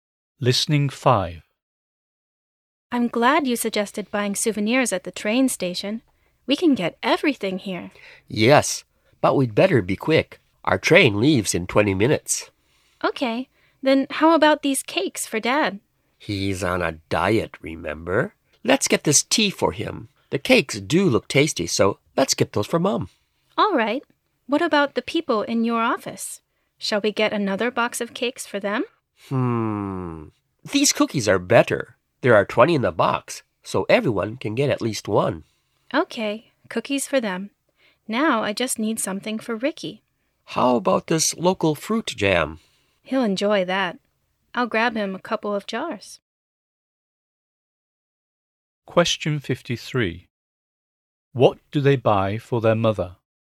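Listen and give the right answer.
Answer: Cakes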